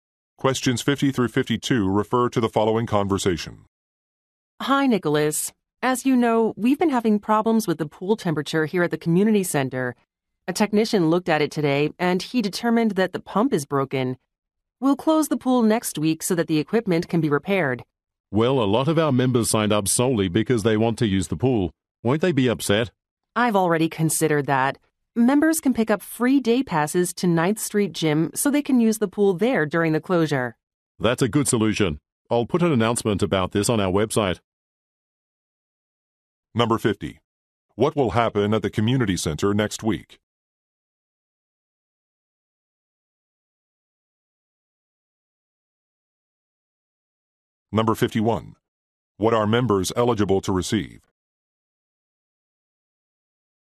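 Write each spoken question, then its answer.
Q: What will happen at the community center next week?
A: The pool will close for repairs

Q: What are members eligible to receive?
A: Free day passes to 9th Street Gym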